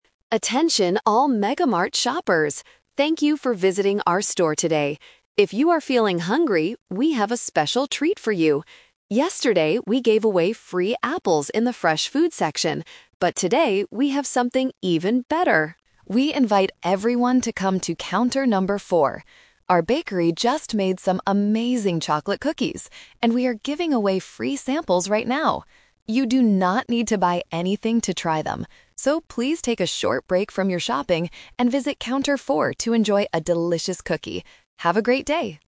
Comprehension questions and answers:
Listen to the supermarket announcement and choose the correct answer (A, B, or C).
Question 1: What is the supermarket giving away today?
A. Free apples.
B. Free chocolate cookies.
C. Free cups of coffee.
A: B. Free chocolate cookies.

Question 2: Where should the shoppers go to get the free food?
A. To the fresh food section.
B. To the checkout area.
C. To Counter 4.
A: C. To Counter 4.

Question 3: How much do the shoppers have to pay for the cookies?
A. Four dollars.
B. Nothing.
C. Half the normal price.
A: B. Nothing.

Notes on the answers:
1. The announcer says, "Our bakery just made some amazing chocolate cookies, and we are giving away free samples right now." Option A is the Trap because the apples were free yesterday, not today. Option C is a plausible supermarket sample but is not mentioned.
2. The announcer invites everyone to "come to Counter number 4." Option A is the Trap (it is where they gave away apples yesterday). Option B is not mentioned.
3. The announcer says, "You do not need to buy anything to try them" (which means the cookies cost nothing; they are free). Option A is the Trap because it uses the number "4" from Counter 4 to confuse the listener about the price. Option C is not mentioned.

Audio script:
Announcer: Attention all MegaMart shoppers. Thank you for visiting our store today. If you are feeling hungry, we have a special treat for you. Yesterday, we gave away free apples in the fresh food section. But today, we have something even better! We invite everyone to come to Counter number 4. Our bakery just made some amazing chocolate cookies, and we are giving away free samples right now. You do not need to buy anything to try them. So, please take a short break from your shopping and visit Counter 4 to enjoy a delicious cookie. Have a great day!

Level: A2

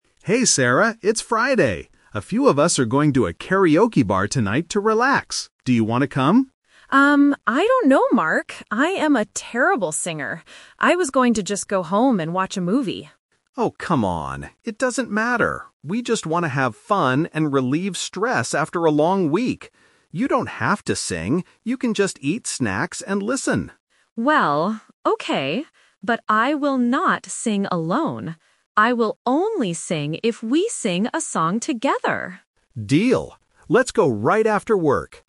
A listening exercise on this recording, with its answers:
Listen to the conversation between two colleagues. Choose the correct answer (A, B, or C) for each question.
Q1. What was Sarah planning to do tonight at first?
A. Go to a karaoke bar.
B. Go home and watch a movie.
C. Eat snacks at a restaurant.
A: B. Go home and watch a movie.

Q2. Why does Sarah hesitate to go to karaoke?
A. Because she thinks she sings badly.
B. Because she is too tired from work.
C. Because she doesn't like loud music.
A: A. Because she thinks she sings badly.

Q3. What will Sarah do at the karaoke bar?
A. She will only eat snacks and listen.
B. She will sing a song alone.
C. She will sing a song with Mark.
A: C. She will sing a song with Mark.

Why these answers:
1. Sarah says, "I was going to just go home and watch a movie." Option (A) is a trap because going to karaoke is Mark's plan and the final outcome, not her initial plan. Option (C) is a distractor using the word "snacks" mentioned later in the audio.
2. Sarah explicitly states the reason: "I am a terrible singer." Option (B) is a logical guess for someone after work, but it is not mentioned in the conversation. Option (C) is plausible but completely unmentioned.
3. Sarah agrees to sing but with a condition: "I will only sing if we sing a song together." Option (A) is a trap because Mark suggested she could just "eat snacks and listen," but her final decision involves singing with him. Option (B) is a trap because she clearly says, "I will not sing alone!"

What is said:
Man: Hey Sarah, it's Friday! A few of us are going to a karaoke bar tonight to relax. Do you want to come?
Woman: Um, I don't know, Mark. I am a terrible singer. I was going to just go home and watch a movie.
Man: Oh, come on! It doesn't matter. We just want to have fun and relieve stress after a long week. You don't have to sing. You can just eat snacks and listen.
Woman: Well... okay. But I will not sing alone! I will only sing if we sing a song together.

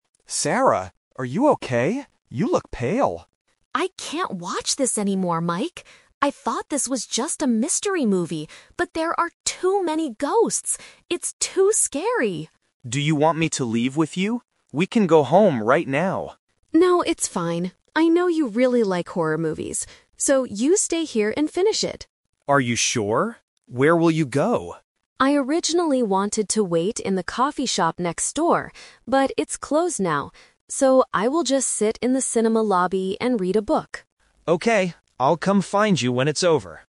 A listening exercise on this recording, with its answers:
Listen to the conversation and choose the correct answer (A, B, or C) for each question.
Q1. What kind of movie did Sarah think they were going to watch?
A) A mystery movie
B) A horror movie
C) A comedy movie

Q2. What will Mike do next?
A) Go home with Sarah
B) Wait in the lobby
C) Stay and finish the movie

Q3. Where will Sarah wait for Mike?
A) In the coffee shop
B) In the cinema lobby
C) In the car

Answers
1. A) A mystery movie
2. C) Stay and finish the movie
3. B) In the cinema lobby

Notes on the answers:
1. Sarah says, "I thought this was just a mystery movie." Option B is the trap because the movie is a horror movie and Mike likes them, but it is not what Sarah thought it was. Option C is not mentioned.
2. Mike asks if they should go home (Option A is the trap), "but" Sarah says no. She tells him, "So, you stay here and finish it." Option B is the trap because that is what Sarah will do, not Mike.
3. Sarah says she "originally wanted to wait in the coffee shop" (Option A is the trap), "but it's closed now. So, I will just sit in the cinema lobby". Option C is not mentioned.

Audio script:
Mike: Sarah, are you okay? You look pale.
Sarah: I can't watch this anymore, Mike. I thought this was just a mystery movie, but there are too many ghosts! It's too scary.
Mike: Do you want me to leave with you? We can go home right now.
Sarah: No, it's fine. I know you really like horror movies. So, you stay here and finish it.
Mike: Are you sure? Where will you go?
Sarah: I originally wanted to wait in the coffee shop next door, but it's closed now. So, I will just sit in the cinema lobby and read a book.

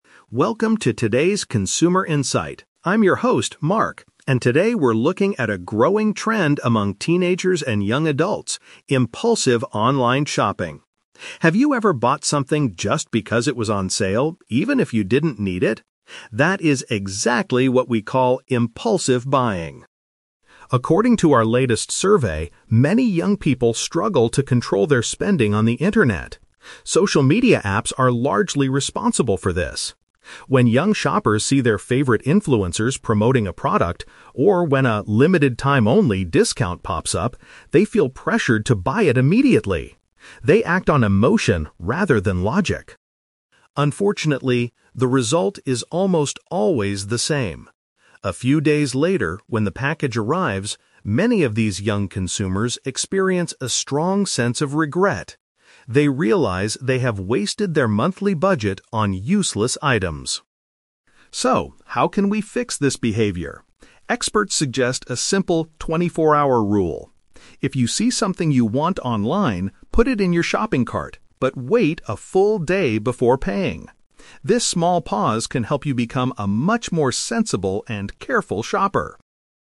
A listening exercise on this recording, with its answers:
Listen to a news reporter talking about online shopping habits. For each question, choose the correct answer A, B, or (C).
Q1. What does the reporter mean by "impulsive buying"?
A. Purchasing items without thinking carefully first.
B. Buying expensive products from famous brands.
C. Purchasing gifts for friends and family online.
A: A. Purchasing items without thinking carefully first.

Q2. According to the report, what makes young people buy things so quickly?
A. They have too much extra money to spend each month.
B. They want to review the products on their own video channels.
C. They are influenced by online celebrities and special offers.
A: C. They are influenced by online celebrities and special offers.

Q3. What is the experts' advice for online shoppers?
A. To delete all social media applications from their phones.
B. To delay their purchasing decision for one whole day.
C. To ask a sensible friend for advice before paying.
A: B. To delay their purchasing decision for one whole day.

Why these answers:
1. The reporter defines impulsive buying as buying something "just because it was on sale, even if you didn't need it" and acting "on emotion rather than logic." This means purchasing without thinking carefully.
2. The reporter says young people feel pressured to buy when they see "favorite influencers promoting a product" (online celebrities) or when a "'limited time only' discount pops up" (special offers).
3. The expert advice is the "24-hour rule," which means you should "wait a full day before paying." To delay a decision means to wait before making it.

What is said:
Reporter: Welcome to today's Consumer Insight. I'm your host, Mark, and today we're looking at a growing trend among teenagers and young adults: impulsive online shopping. Have you ever bought something just because it was on sale, even if you didn't need it? That is exactly what we call impulsive buying.
According to our latest survey, many young people struggle to control their spending on the internet. Social media apps are largely responsible for this. When young shoppers see their favorite influencers promoting a product, or when a 'limited time only' discount pops up, they feel pressured to buy it immediately. They act on emotion rather than logic.
Unfortunately, the result is almost always the same. A few days later, when the package arrives, many of these young consumers experience a strong sense of regret. They realize they have wasted their monthly budget on useless items.
So, how can we fix this behavior? Experts suggest a simple '24-hour rule'. If you see something you want online, put it in your shopping cart, but wait a full day before paying. This small pause can help you become a much more sensible and careful shopper.

